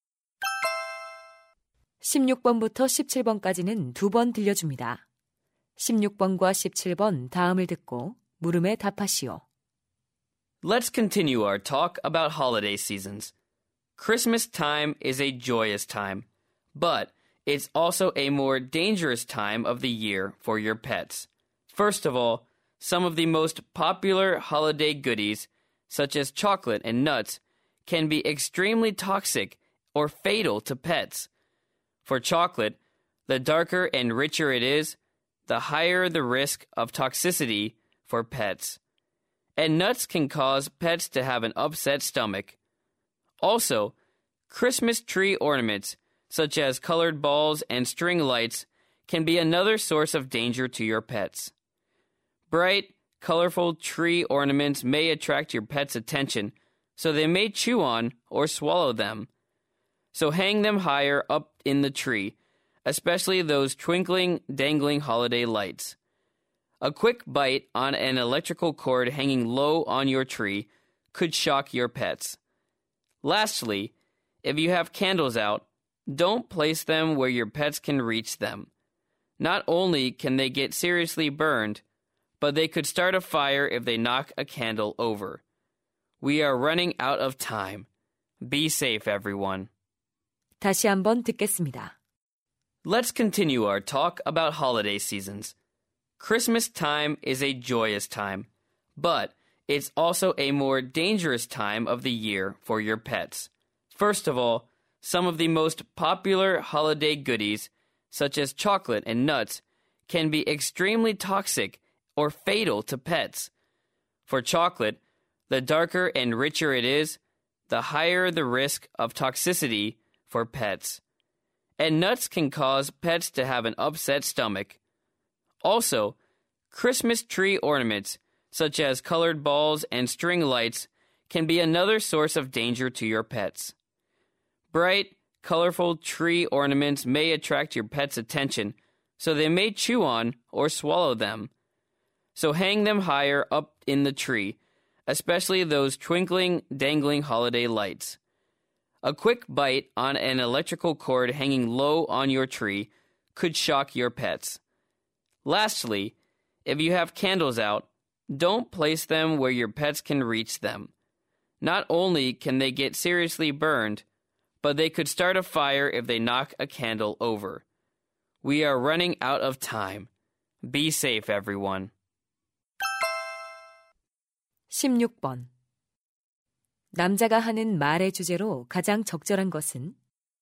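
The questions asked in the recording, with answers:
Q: 남자가 하는 말의 주제로 가장 적절한 것은?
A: 크리스마스 기간 반려동물에게 위험한 것들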